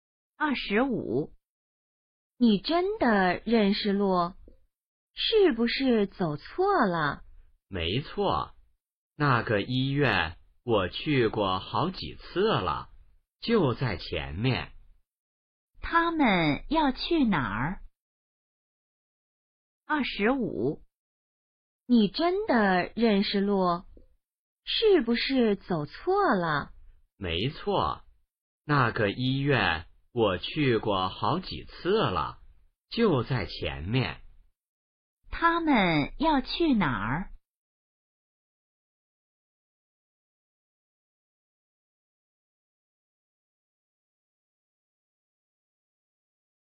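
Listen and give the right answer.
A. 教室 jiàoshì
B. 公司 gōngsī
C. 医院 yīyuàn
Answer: C. 医院 yīyuàn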